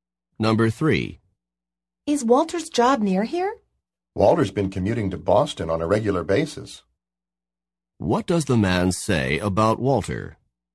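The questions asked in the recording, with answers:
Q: What does the man say about Walter?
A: He regularly commutes to Boston for work.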